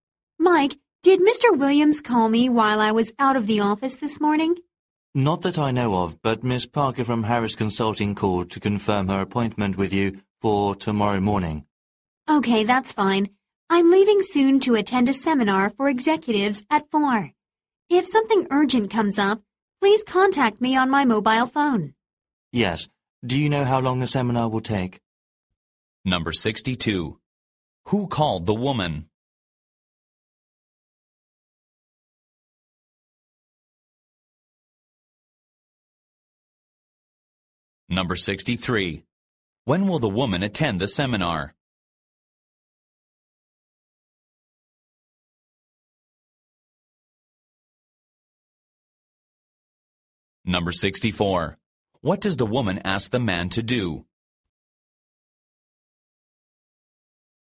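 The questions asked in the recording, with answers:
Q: Who called the woman?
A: Miss Parker from Harris Consulting

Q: When will the woman attend the seminar?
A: At 4 (this afternoon)

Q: What does the woman ask the man to do?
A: Contact her on her mobile phone if something urgent comes up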